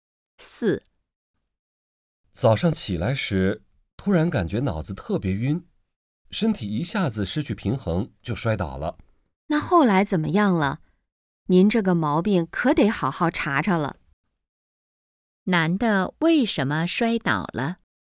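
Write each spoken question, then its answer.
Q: 男的为什么摔倒了?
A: 脑子突然很晕,身体失去平衡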